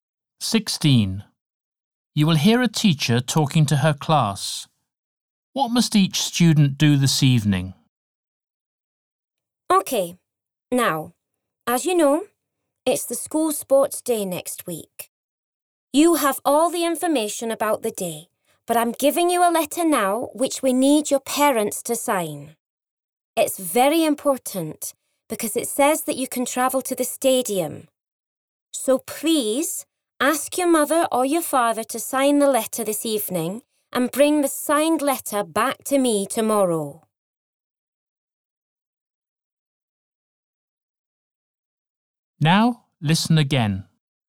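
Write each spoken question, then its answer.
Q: What must each student do this evening?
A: Get a parent to sign the letter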